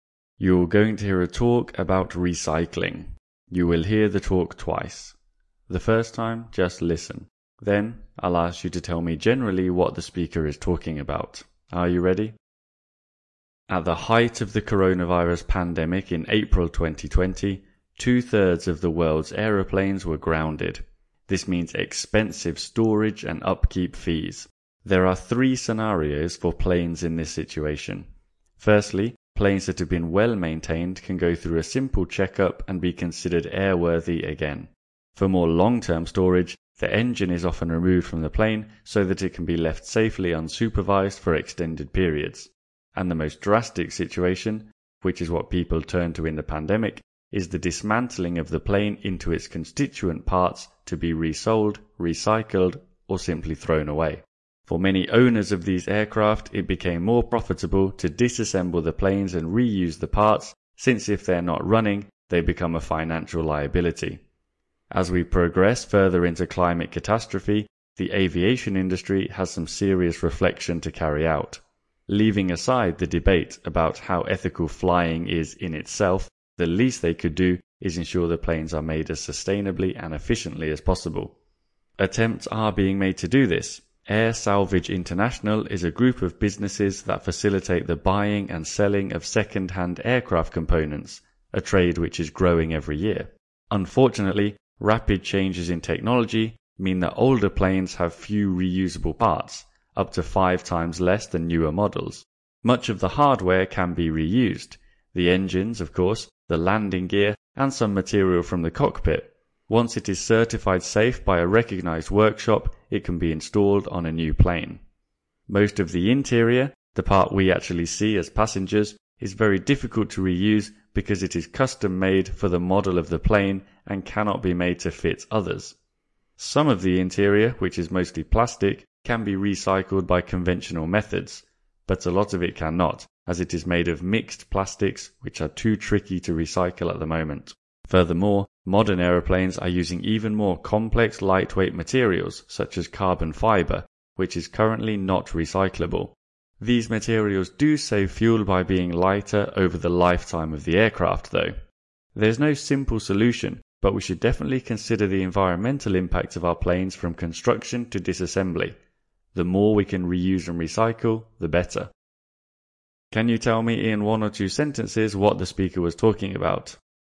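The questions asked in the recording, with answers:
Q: Can you tell me in one or two sentences what the speaker was talking about?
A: What happens to aeroplanes that were grounded in the pandemic, and how far their parts can be reused and recycled to make aviation more sustainable.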